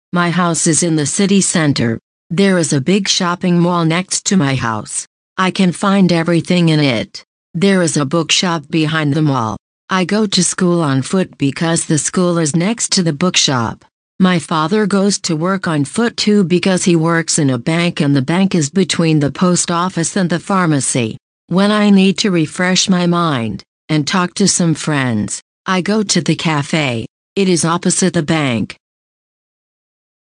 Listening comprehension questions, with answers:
A. Dinleyin ve boşlukları doldurun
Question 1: The big ________________ is next to my house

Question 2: The school is next to the ________________.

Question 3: The bank is between the post office and the ________________.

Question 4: The café is ________________ the bank.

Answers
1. SHOPPING MALL
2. BOOKSHOP
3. PHARMACY
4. OPPOSITE

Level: 9. sınıf